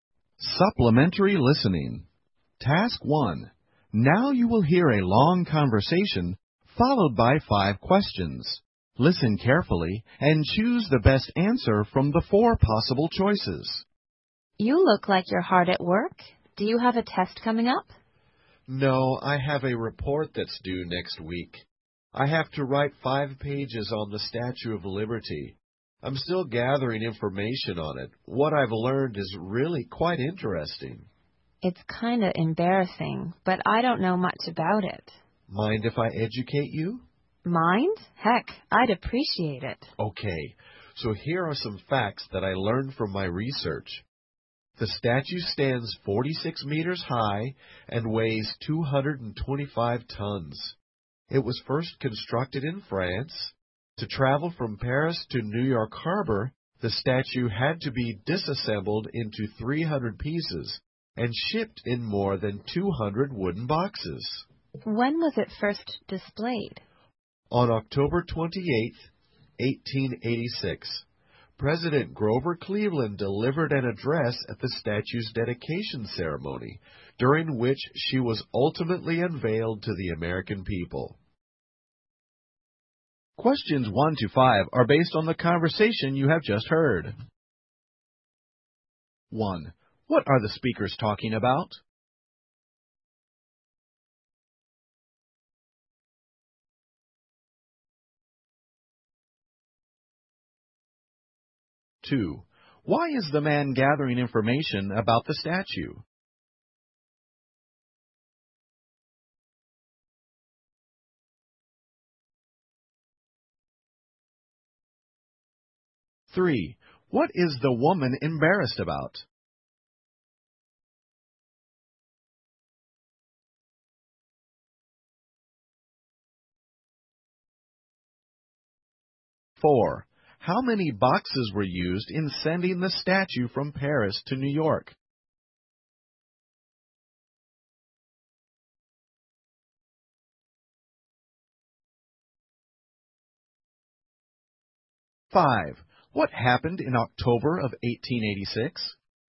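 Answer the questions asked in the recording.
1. The Statue of Liberty
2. He has to write a report on it
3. She doesn't know much about the Statue of Liberty
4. More than 200
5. The statue was first displayed and dedicated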